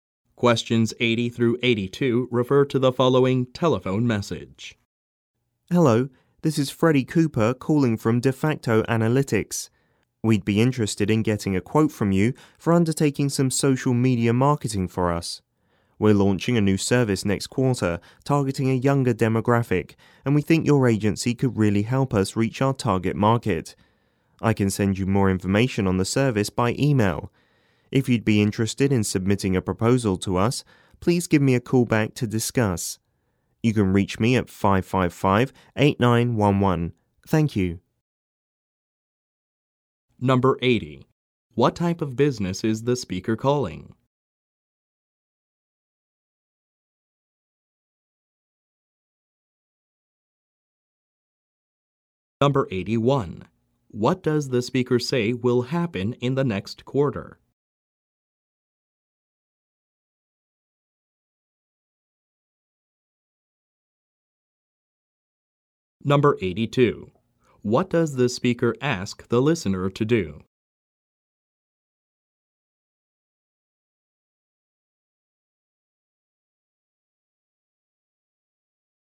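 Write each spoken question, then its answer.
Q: What type of business is the speaker calling?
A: A marketing agency (social media marketing)

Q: What does the speaker say will happen in the next quarter?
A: A new service will be launched

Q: What does the speaker ask the listener to do?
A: Call him back to discuss submitting a proposal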